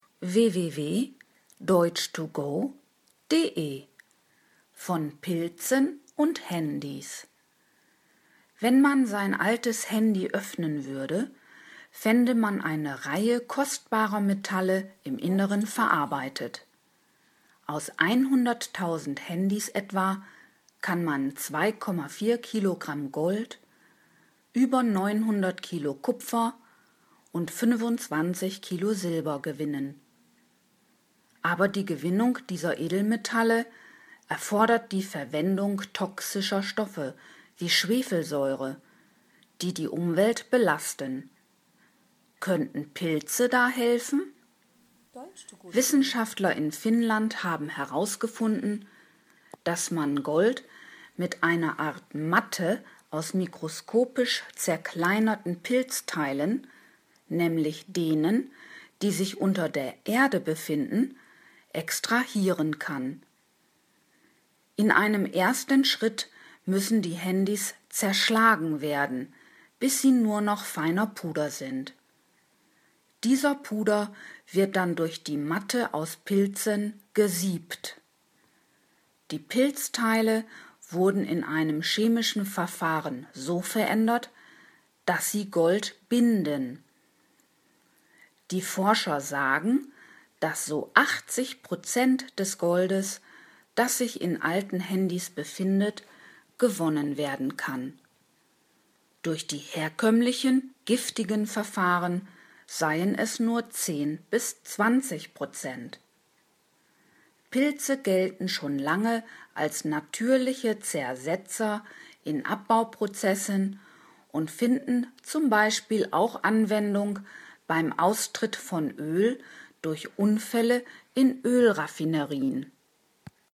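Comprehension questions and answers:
Haben Sie das gehört? Stimmt diese Aussage?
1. Aus 100.000 Handys kann man eine beträchtliche Menge an wertvollen Metallen gewinnen, z.B. 25 kg Silber.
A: richtig

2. Die Gewinnung von Edelmetallen mit Hilfe von Schwefelsäure ist für die Umwelt unbedenklich.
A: falsch

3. Wissenschaftler in Holland haben herausgefunden, dass Pilze bei der Gewinnung von Gold aus alten Handys helfen können.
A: falsch

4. Aus mikroskopisch kleinen Pilzteilen wird eine Matte erzeugt.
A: richtig

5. Die Handys müssen vor dem Kontakt mit den Pilzen zu feinem Puder zerschlagen werden.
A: richtig

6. Die pulversisierten Handys werden mit den mikroskopisch kleinen Pilzteilen zu einem Brei vermischt.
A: falsch

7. Die durch ein chemisches Verfahren veränderten Pilzteile können Gold binden.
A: richtig

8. 80 Prozent des im Handy befindlichen Goldes kann so gewonnen werden.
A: richtig

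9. Durch herkömmliche umweltschädigende Verfahren können 20-30 Prozent des Goldes gewonnen werden.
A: falsch

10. Pilze werden auch bei Öllecks als natürliche Zersetzer eingesetzt.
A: richtig

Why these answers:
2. Stoffe wie Schwefelsäure sind toxisch und daher belastend für die Umwelt.
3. Es waren Wissenschaftler aus Finnland.
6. Das Pulver, das aus den zerschlagenen Handys entstanden ist, wird durch die Matte aus Pilzen gesiebt.
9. Es sind nur 10-20 Prozent.

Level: C (schwer)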